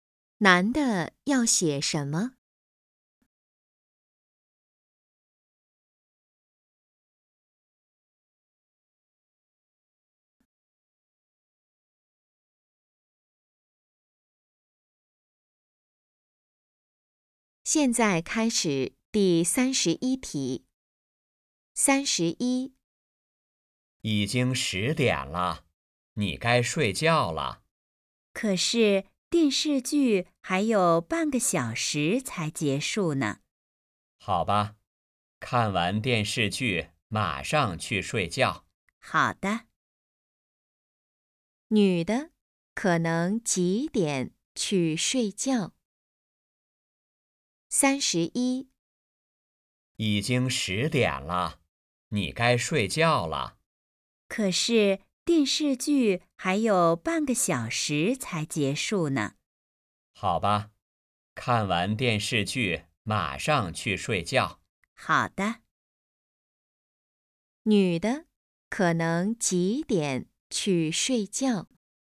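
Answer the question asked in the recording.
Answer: 十点半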